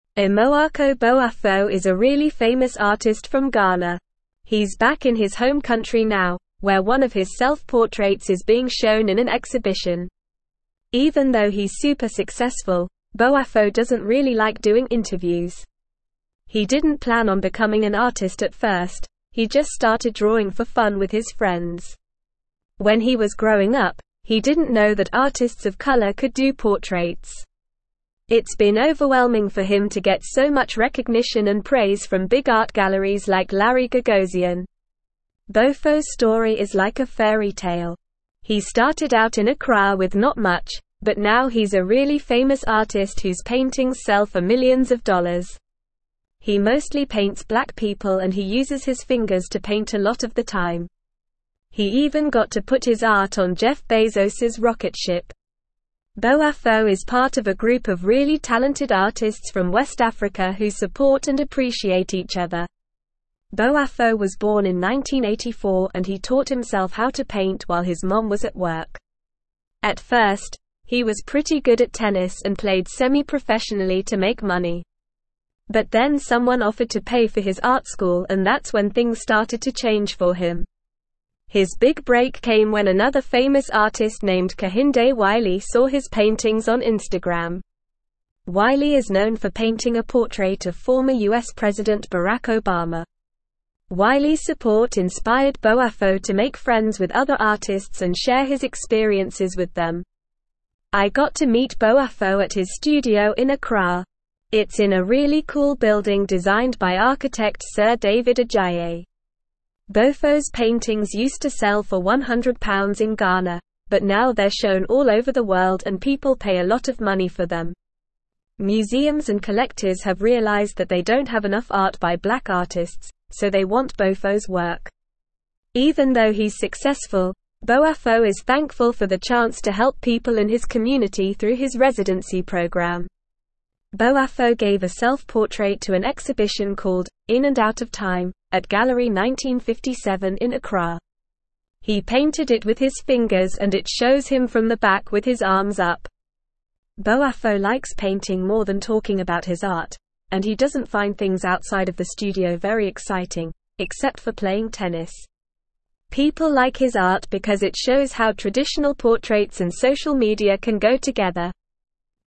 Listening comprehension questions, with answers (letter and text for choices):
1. Boafo initially started drawing for fun with his friends and did not plan on becoming an artist.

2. Boafo is part of a supportive community of talented artists from West Africa.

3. Boafo's rise to fame is nothing like a fairy tale, as he started with a lot in Accra but now sells his paintings for pennies.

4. Amoako Boafo is an unknown artist from Ghana who is currently exhibiting one of his self-portraits in his home country.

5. Despite his success, Boafo is a fan of doing interviews.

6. Boafo has received underwhelming recognition and criticism from prestigious art galleries like Larry Gagosian.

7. Boafo primarily paints black people and often uses his fingers as tools.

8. Growing up, Boafo was unaware that artists of color could create portraits.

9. Amoako (1)______ is a really famous artist from (2)______.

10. Amoako (1)______ is a really famous artist from (2)______.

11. Even though he's super successful, Boafo doesn't really like doing (3)______.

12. It's been overwhelming for him to get so much recognition and praise from big art galleries like Larry (4)______.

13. He started out in Accra with not much, but now he's a really famous (5)______ whose paintings sell for millions of dollars.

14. He mostly paints (6)______ people and he uses his fingers to paint a lot of the time.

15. Boafo is part of a (7)______ of really talented (8)______ from West Africa who support and appreciate each other.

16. Boafo is part of a (7)______ of really talented (8)______ from West Africa who support and appreciate each other.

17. Wiley is known for painting a (9)______ of former US President Barack (10)______.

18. Wiley is known for painting a (9)______ of former US President Barack (10)______.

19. I got to meet Boafo at his (11)______ in Accra.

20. It's in a really cool building designed by architect Sir David (12)______.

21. Even though he's successful, Boafo is thankful for the chance to help people in his community through his residency (13)______.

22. Boafo gave a self-portrait to an exhibition called "In and Out of Time" at Gallery 1957 in (14)______.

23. Boafo likes (15)______ more than talking about his art, and he doesn't find things outside of the studio very exciting, except for playing tennis.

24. People like his art because it shows how traditional portraits and social (16)______ can go together.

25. Where is Amoako Boafo from?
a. Nigeria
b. Ghana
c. Kenya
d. South Africa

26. How did Boafo start his career as an artist?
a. By drawing for fun with his friends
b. By attending art school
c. By getting discovered on social media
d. By working in a gallery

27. What kind of paintings does Boafo mostly create?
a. Landscapes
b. Abstract art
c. Still life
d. Portraits of black people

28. How does Boafo paint his artwork?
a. With his fingers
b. With a paintbrush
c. With a spray can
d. With a palette knife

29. Who is the famous artist that discovered Boafo's work on Instagram?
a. Jeff Bezos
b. Barack Obama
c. Kehinde Wiley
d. Larry Gagosian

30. Where is Boafo's studio located?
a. London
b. New York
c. Paris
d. Accra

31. What does Boafo's self-portrait in the exhibition show?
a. Him holding a paintbrush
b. Him from the back with his arms up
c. Him playing tennis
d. Him with his friends in the studio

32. What country is Amoako Boafo originally from?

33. What unique method does Boafo often use in his paintings?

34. What is the title of the exhibition in Accra where Boafo's self-portrait is displayed?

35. Besides painting, what other activity does Boafo enjoy?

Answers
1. True
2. True
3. False
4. False
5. False
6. False
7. True
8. True
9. Boafo
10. Ghana
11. interviews
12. Gagosian
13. artist
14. black
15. group
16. artists
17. portrait
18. Obama
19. studio
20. Adjaye
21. program
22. Accra
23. painting
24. media
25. b. Ghana
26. a. By drawing for fun with his friends
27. d. Portraits of black people
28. a. With his fingers
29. c. Kehinde Wiley
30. d. Accra
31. b. Him from the back with his arms up
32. Amoako Boafo is from Ghana.
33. Boafo often uses his fingers to paint.
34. The exhibition is called "In and Out of Time."
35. Boafo enjoys playing tennis.

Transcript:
Amoako Boafo is a really famous artist from Ghana. He's back in his home country now, where one of his self-portraits is being shown in an exhibition. Even though he's super successful, Boafo doesn't really like doing interviews. He didn't plan on becoming an artist at first, he just started drawing for fun with his friends. When he was growing up, he didn't know that artists of color could do portraits. It's been overwhelming for him to get so much recognition and praise from big art galleries like Larry Gagosian.
Boafo's story is like a fairy tale. He started out in Accra with not much, but now he's a really famous artist whose paintings sell for millions of dollars. He mostly paints black people and he uses his fingers to paint a lot of the time. He even got to put his art on Jeff Bezos's rocket ship. Boafo is part of a group of really talented artists from West Africa who support and appreciate each other.
Boafo was born in 1984 and he taught himself how to paint while his mom was at work. At first, he was pretty good at tennis and played semi-professionally to make money. But then someone offered to pay for his art school and that's when things started to change for him. His big break came when another famous artist named Kehinde Wiley saw his paintings on Instagram. Wiley is known for painting a portrait of former US President Barack Obama. Wiley's support inspired Boafo to make friends with other artists and share his experiences with them.
I got to meet Boafo at his studio in Accra. It's in a really cool building designed by architect Sir David Adjaye. Boafo's paintings used to sell for £100 in Ghana, but now they're shown all over the world and people pay a lot of money for them. Museums and collectors have realized that they don't have enough art by black artists, so they want Boafo's work. Even though he's successful, Boafo is thankful for the chance to help people in his community through his residency program.
Boafo gave a self-portrait to an exhibition called "In and Out of Time" at Gallery 1957 in Accra. He painted it with his fingers and it shows him from the back with his arms up. Boafo likes painting more than talking about his art, and he doesn't find things outside of the studio very exciting, except for playing tennis. People like his art because it shows how traditional portraits and social media can go together.

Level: Level 3